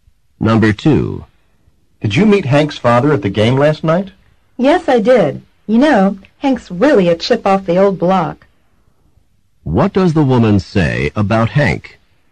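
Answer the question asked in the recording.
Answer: Hank is very much like his father.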